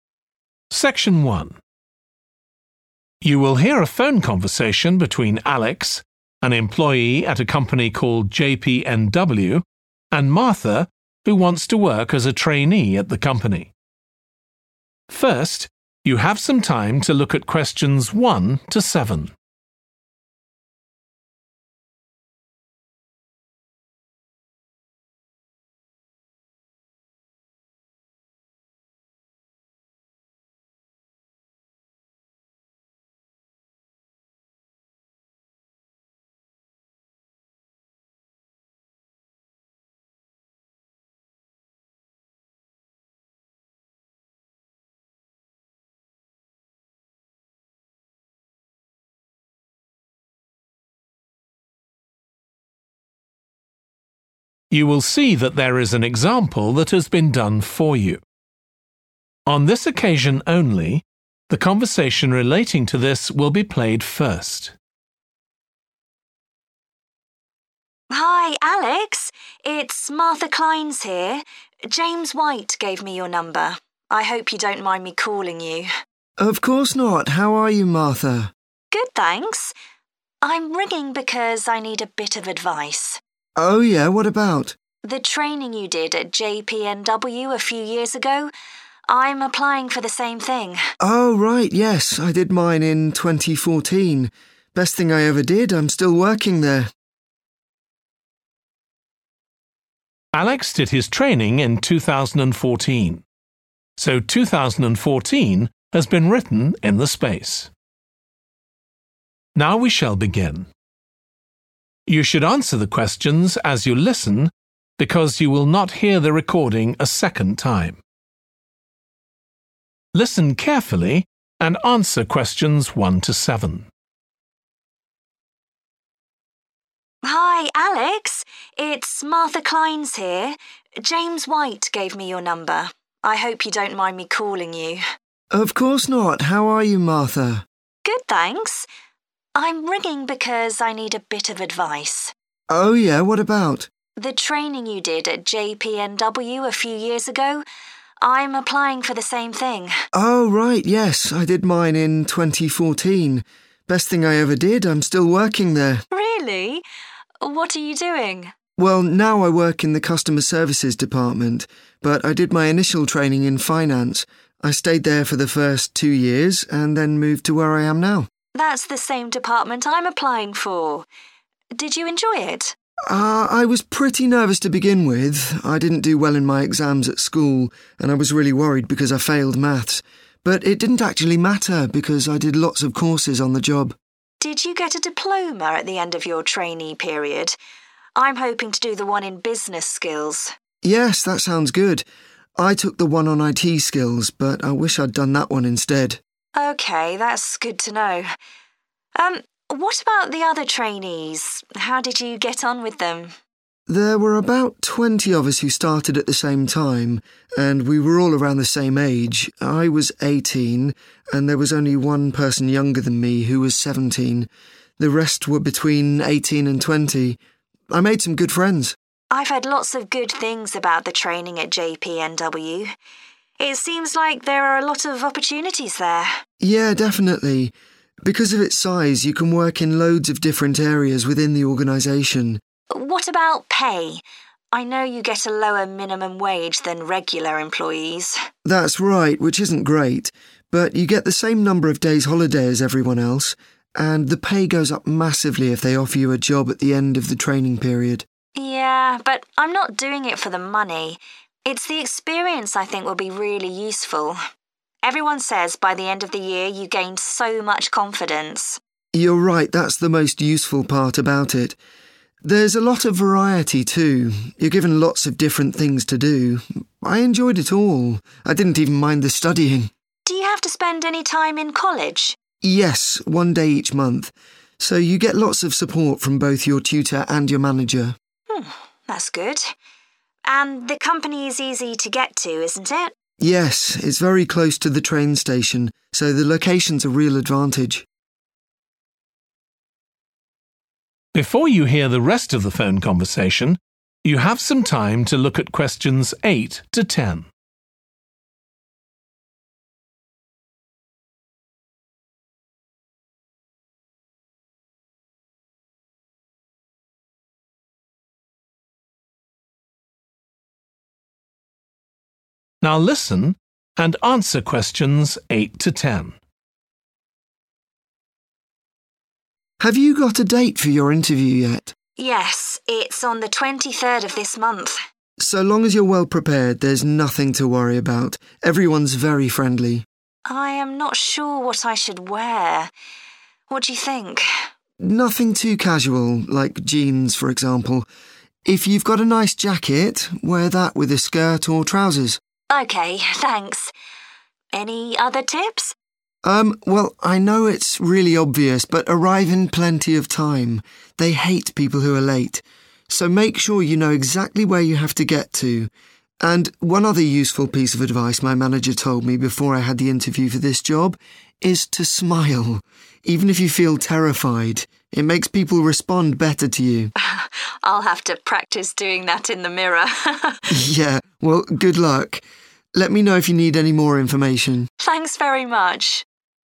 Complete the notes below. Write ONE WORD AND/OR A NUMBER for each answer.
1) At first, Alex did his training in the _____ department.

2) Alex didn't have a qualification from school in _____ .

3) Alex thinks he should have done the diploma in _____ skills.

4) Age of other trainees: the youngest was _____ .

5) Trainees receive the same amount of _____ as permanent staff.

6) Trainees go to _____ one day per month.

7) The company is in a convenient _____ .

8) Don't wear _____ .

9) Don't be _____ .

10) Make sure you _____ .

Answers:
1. Finance
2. Maths / Math / Mathematics
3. business
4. 17 / seventeen
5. holiday / holidays / vacation / vacations
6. college
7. location
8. jeans
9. late
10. smile

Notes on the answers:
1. I did my initial training in Finance.
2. I didn't do well in my exams at school and I was really worried because I failed Maths.
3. I took the one on IT skills but I wish I'd done that one instead.
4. there was only one person younger than me, how was 17.
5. Buy you get the same number of days' holiday as everyone else.
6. Yes, one day each month.
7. Yes, it's very close to the train station so the location's a real advantage.
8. Nothing too casual – like jeans
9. Erm, well I know it's really obvious but arrive in plenty of time.
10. And one other useful piece of advice my manager told me before I had the interview for this job – is to smile.

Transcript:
James White gave me your number. I hope you don't mind me calling you.
ALEX: Of course not. How are you, Martha?
MARTHA: Good thanks. I'm ringing because I need a bit of advice.
ALEX: Oh yeah. What about?
MARTHA: The training you did at JPNW a few years ago. I'm applying for the same thing.
ALEX: Oh right. Yes, I did mine in 2014. Best thing I ever did. I'm still working there.
MARTHA: Really? What are you doing?
ALEX: Well, now I work in the customer services department but I did my initial training in Finance. I stayed there for the first two years and then moved to where I am now.
MARTHA: That's the same department I'm applying for. Did you enjoy it?
ALEX: I was pretty nervous to begin with. I didn't do well in my exams at school and I was really worried because I failed Maths. But it didn't actually matter because I did lots of courses on the job.
MARTHA: Did you get a diploma at the end of your trainee period? I'm hoping to do the one in business skills.
ALEX: Yes. That sounds good. I took the one on IT skills but I wish I'd done that one instead.
MARTHA: OK, that's good to know. What about the other trainees? How did you get on with them?
ALEX: There were about 20 of us who started at the same time and we were all around the same age – I was 18 and there was only one person younger than me, how was 17. The rest were between 18 and 20. I made some good friends.
MARTHA: I've heard lots of good things about the training at JPNW. It seems like there are a lot of opportunities there.
ALEX: Yeah, definitely. Because of its size you can work in loads of different areas within the organisation.
MARTHA: What about pay? I know you get a lower minimum wage than regular employees.
ALEX: That's right – which isn't great. Buy you get the same number of days' holiday as everyone else. And the pay goes up massively if they offer you a job at the end of the training period.
MARTHA: Yeah, but I'm not doing it for the money – it's the experience I think will be really useful. Everyone says by the end of the year you gain so much confidence.
ALEX: You're right. That's the most useful part about it. There's a lot of variety too. You're given lots of different things to do. I enjoyed it all – I didn't even mind the studying.
MARTHA: Do you have to spend any time in college?
ALEX: Yes, one day each month. So you get lots of support from both your tutor and your manager.
MARTHA: That's good. And the company is easy to get to, isn't it?
ALEX: Yes, it's very close to the train station so the location's a real advantage.
ALEX: Have you got a date for your interview yet?
MARTHA: Yes, it's on the 23rd of this month.
ALEX: So long as you're well prepared there's nothing to worry about. Everyone's very friendly.
MARTHA: I am not sure what I should wear. What do you think?
ALEX: Nothing too casual – like jeans, for example. If you've got a nice jacket, wear that with a skirt or trousers.
MARTHA: OK. Thanks. Any other tips?
ALEX: Erm, well I know it's really obvious but arrive in plenty of time. They hate people who are late. So make sure you know exactly where you have to get to. And one other useful piece of advice my manager told me before I had the interview for this job – is to smile. Even if you feel terrified. It makes people respond better to you.
MARTHA: I'll have to practise doing that in the mirror!
ALEX: Yeah – well, good luck. Let me know if you need any more information.
MARTHA: Thanks very much.